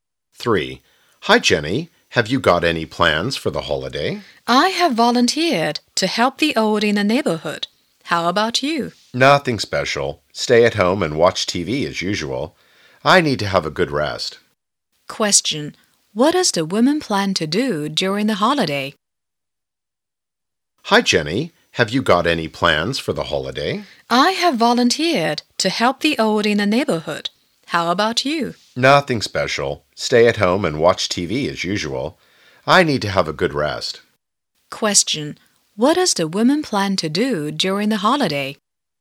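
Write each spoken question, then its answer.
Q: What does the woman plan to do during the holiday?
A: Help the old in the neighborhood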